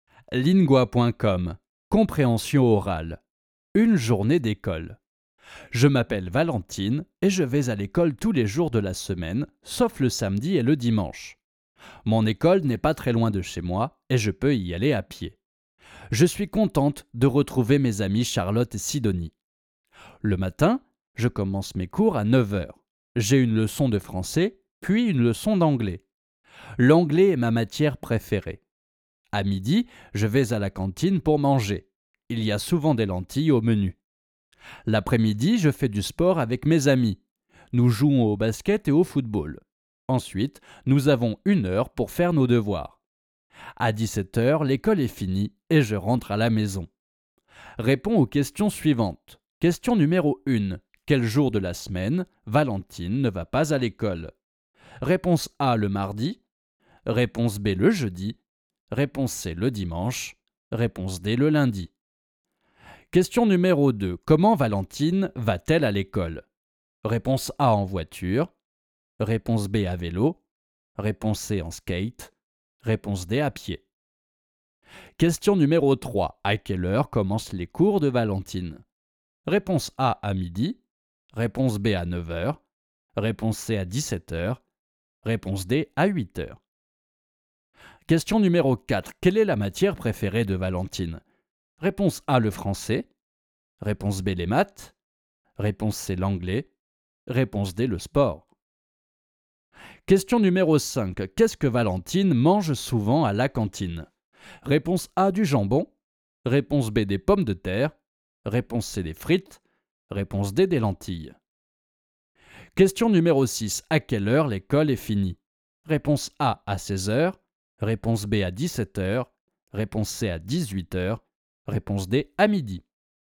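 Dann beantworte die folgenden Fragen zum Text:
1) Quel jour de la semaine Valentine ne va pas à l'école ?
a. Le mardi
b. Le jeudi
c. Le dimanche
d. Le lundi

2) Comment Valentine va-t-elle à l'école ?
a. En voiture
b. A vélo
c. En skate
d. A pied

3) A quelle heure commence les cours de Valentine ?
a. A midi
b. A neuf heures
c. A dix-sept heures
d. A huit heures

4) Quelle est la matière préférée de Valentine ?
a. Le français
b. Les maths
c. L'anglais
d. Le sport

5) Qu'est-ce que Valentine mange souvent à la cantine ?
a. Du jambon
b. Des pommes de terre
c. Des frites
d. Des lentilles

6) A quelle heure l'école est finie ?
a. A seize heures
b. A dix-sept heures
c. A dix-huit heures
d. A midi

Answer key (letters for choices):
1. c
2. d
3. b
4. c
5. d
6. b

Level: Basis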